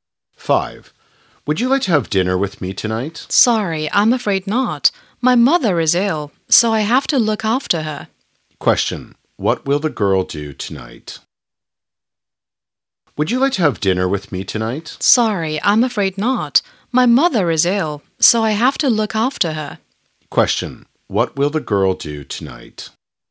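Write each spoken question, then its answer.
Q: What will the girl do tonight?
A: Look after her sick mother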